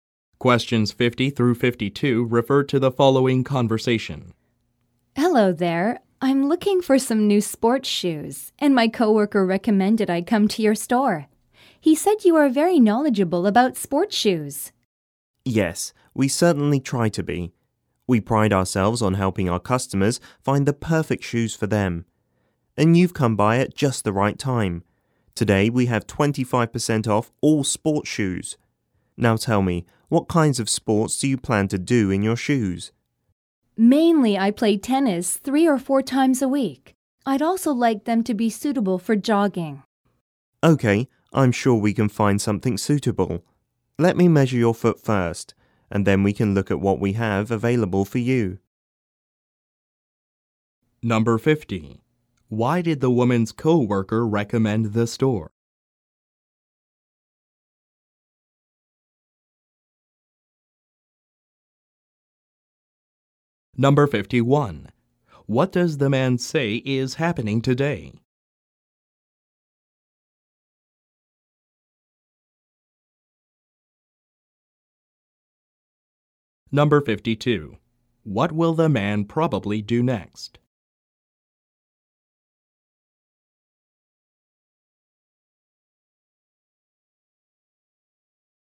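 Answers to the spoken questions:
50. The staff are very knowledgeable about sports shoes
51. A sale with 25% off all sports shoes
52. Measure the woman's foot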